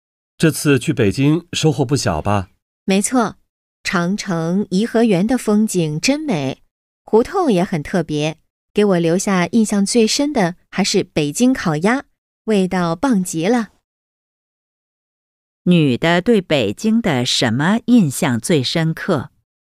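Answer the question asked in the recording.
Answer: 北京烤鸭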